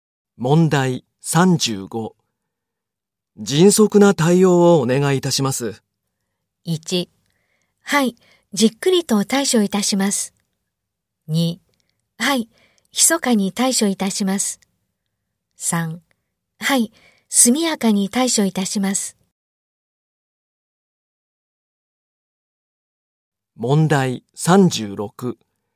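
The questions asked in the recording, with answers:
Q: 迅速な対応をお願いいたします。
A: 3: はい、速やかに対処いたします。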